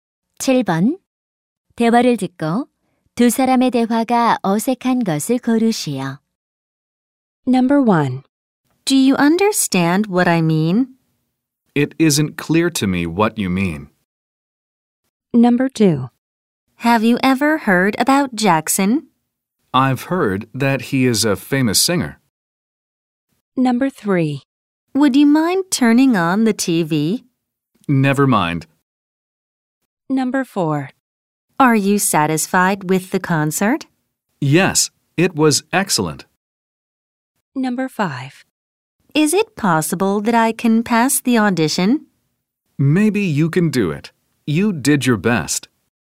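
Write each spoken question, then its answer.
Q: 대화를 듣고 두 사람의 대화가 어색한 것을 고르시오.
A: 3: Would you mind turning on the TV? / Never mind.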